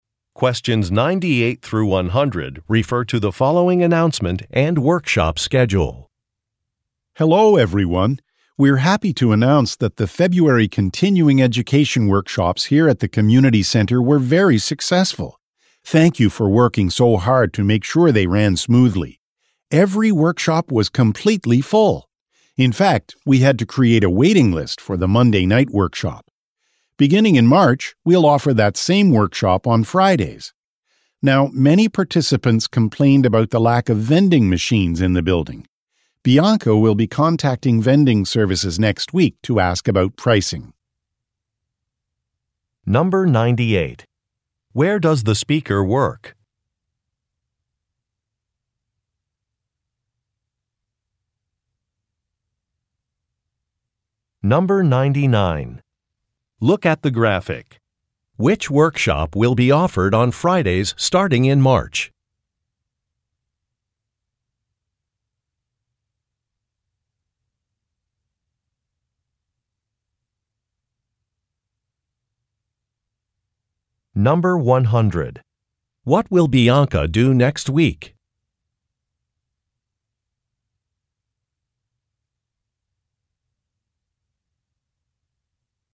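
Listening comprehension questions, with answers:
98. Where does the speaker work?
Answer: At a community center

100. What will Bianca do next week?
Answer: Contact vending services about pricing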